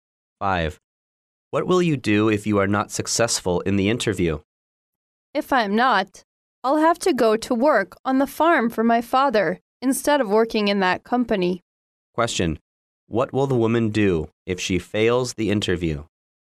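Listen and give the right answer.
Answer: Work on her father's farm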